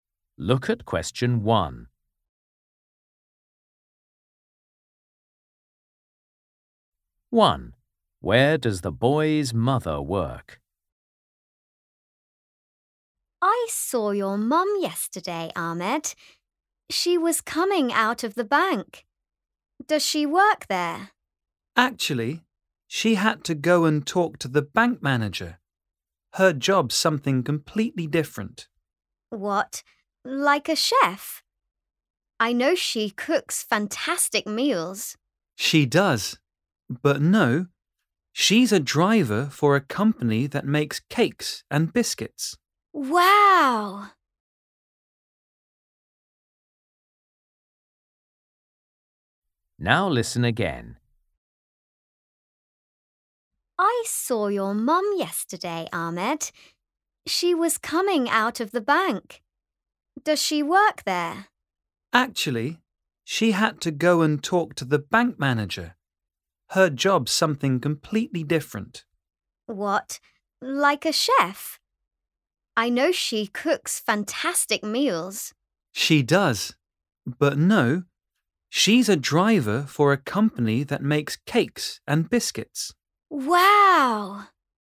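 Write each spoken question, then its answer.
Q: Where does the boy's mother work?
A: at a company that makes cakes and biscuits (as a driver)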